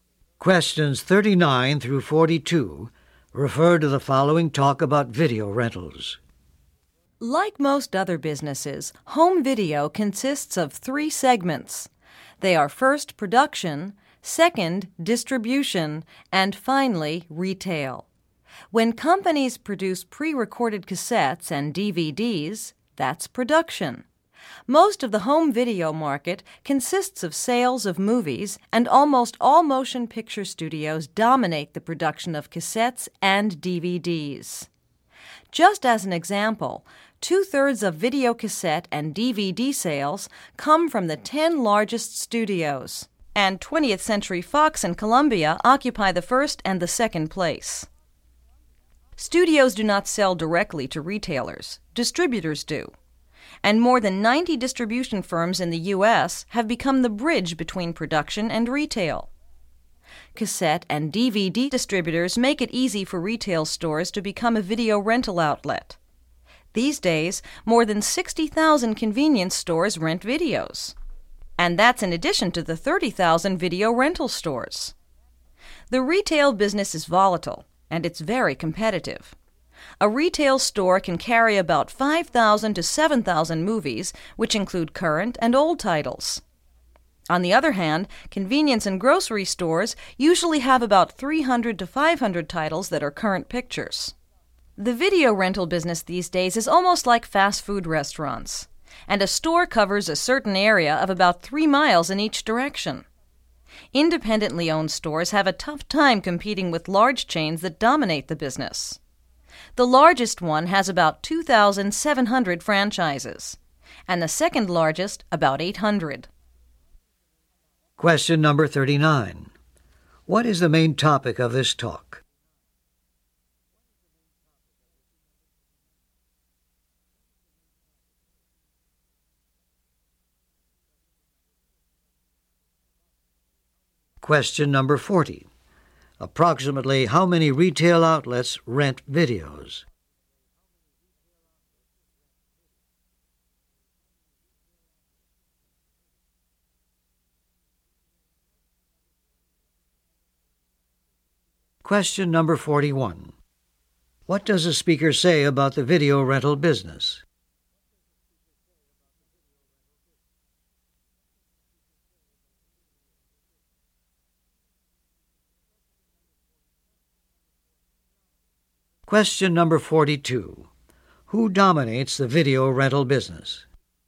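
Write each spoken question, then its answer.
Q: What is the main topic of this talk?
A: The home video (video rental) business

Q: Approximately how many retail outlets rent videos?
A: About 90,000

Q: Who dominates the video rental business?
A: Large chains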